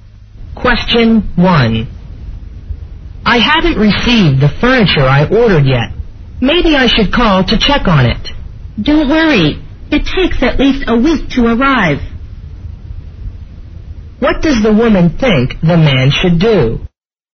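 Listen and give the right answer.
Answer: Wait patiently for the furniture instead of calling, since delivery takes at least a week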